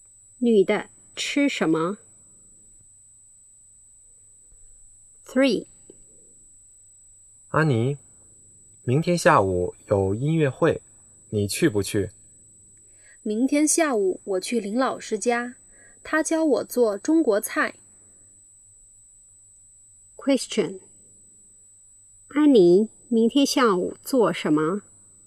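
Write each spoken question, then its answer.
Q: 安妮明天下午做什么?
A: 去林老师家学做中国菜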